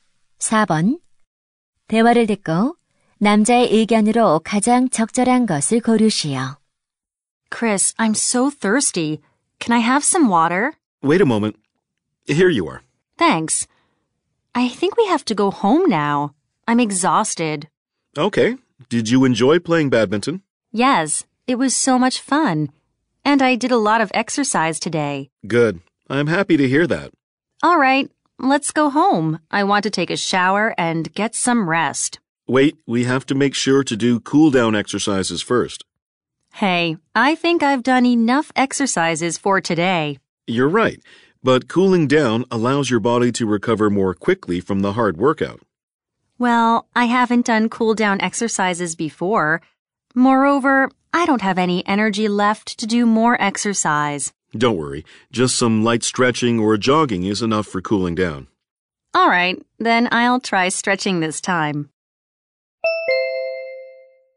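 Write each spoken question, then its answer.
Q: 대화를 듣고 남자의 의견으로 가장 적절한 것을 고르시오.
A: 운동 후에는 정리 운동을 해야 한다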